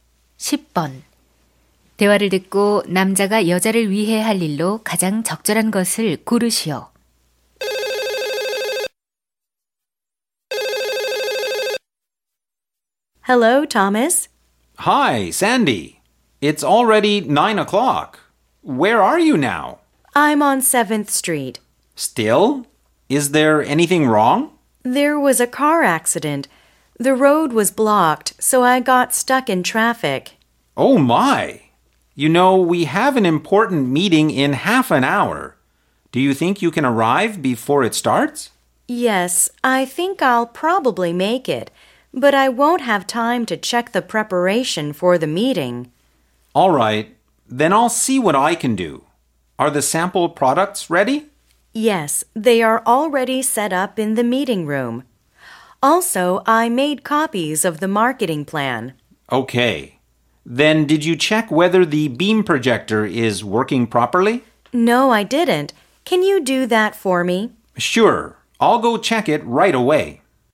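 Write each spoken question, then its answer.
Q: 대화를 듣고 남자가 여자를 위해 할 일로 가장 적절한 것을 고르시오.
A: 빔 프로젝터 작동 확인하기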